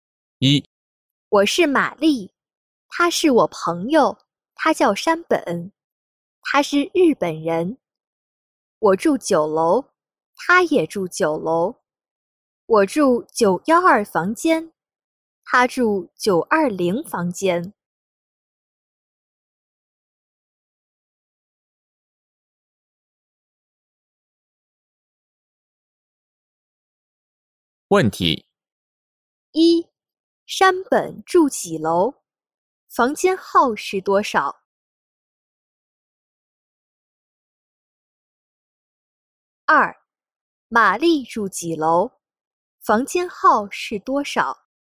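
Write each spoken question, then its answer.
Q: 山本住几楼?房间号是多少?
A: 九楼,920房间

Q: 玛丽住几楼?房间号是多少?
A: 九楼,912房间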